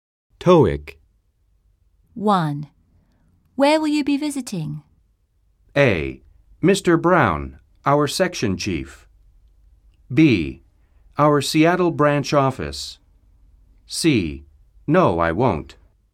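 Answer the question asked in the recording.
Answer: B: Our Seattle branch office.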